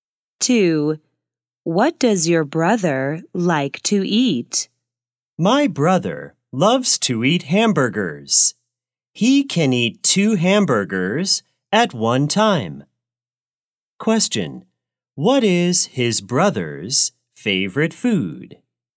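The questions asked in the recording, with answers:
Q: What is his brother's favorite food?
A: hamburgers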